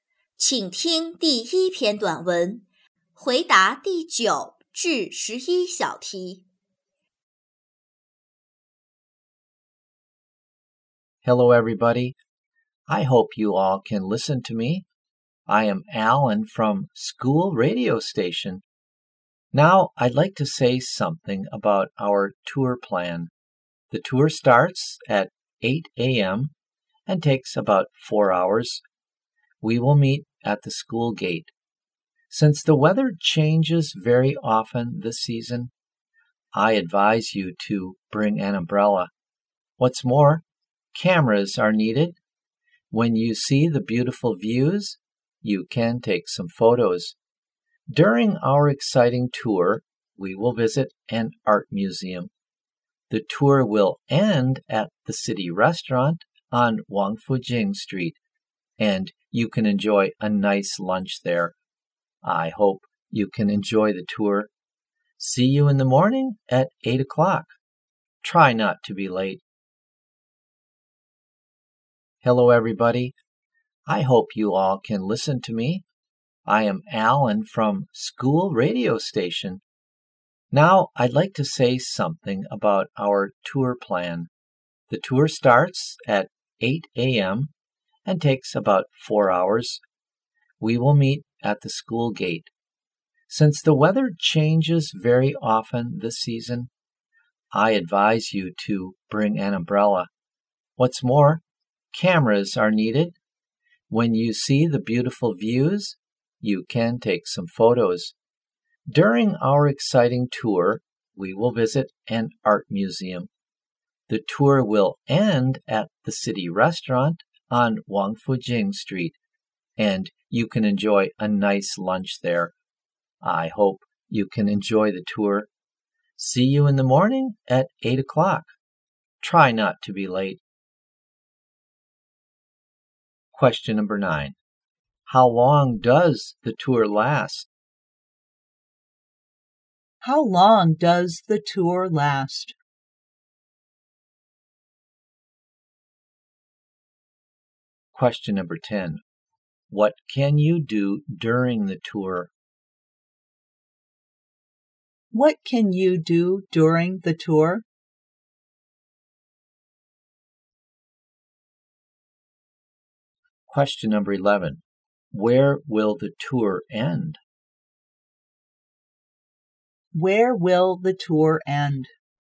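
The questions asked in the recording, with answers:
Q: How long does the tour last?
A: About 4 hours

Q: Where will the tour end?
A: At the city restaurant on Wangfujing Street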